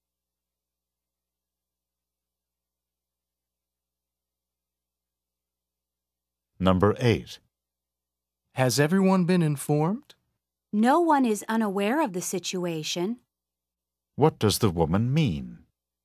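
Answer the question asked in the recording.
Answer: Everyone has been informed.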